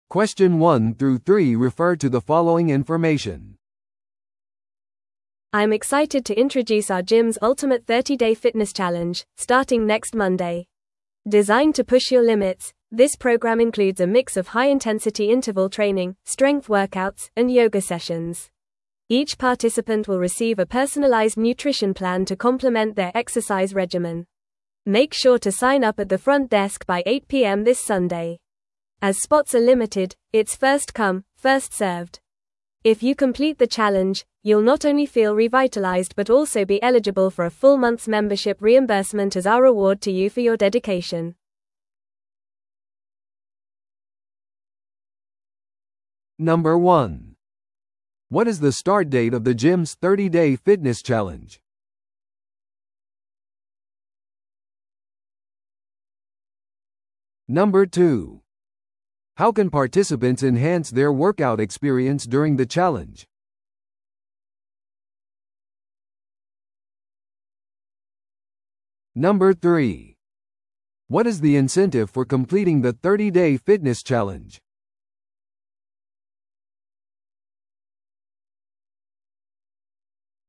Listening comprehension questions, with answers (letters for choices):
Listen to the audio below and answer the questions.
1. What is the start date of the gym's 30-day fitness challenge?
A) この日曜日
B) 次の月曜日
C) 次の水曜日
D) 次の金曜日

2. How can participants enhance their workout experience during the challenge?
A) サウナを独占的に使用することで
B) モチベーション向上のセミナーに出席することで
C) パーソナライズされた栄養計画に従うことで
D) 現金賞金を競うことで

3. What is the incentive for completing the 30-day fitness challenge?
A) トロフィーと修了証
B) 無料のジムアクセサリー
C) 1ヶ月分の会員費の返金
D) セレブトレーナーとの個人トレーニングセッション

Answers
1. B
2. C
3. C

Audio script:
I'm excited to introduce our gym's ultimate 30-day fitness challenge, starting next Monday! Designed to push your limits, this program includes a mix of high-intensity interval training, strength workouts, and yoga sessions. Each participant will receive a personalized nutrition plan to complement their exercise regimen. Make sure to sign up at the front desk by 8pm this Sunday. As spots are limited, it's first-come, first-served. If you complete the challenge, you'll not only feel revitalized but also be eligible for a full month's membership reimbursement as our reward to you for your dedication.